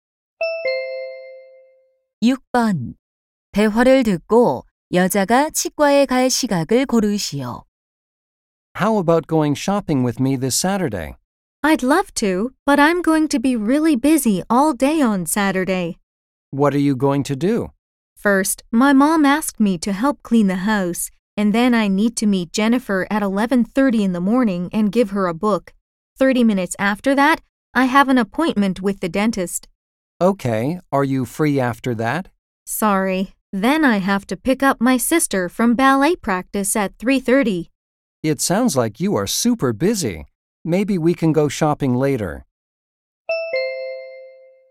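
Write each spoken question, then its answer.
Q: 대화를 듣고 여자가 치과에 갈 시각을 고르시오.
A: 12시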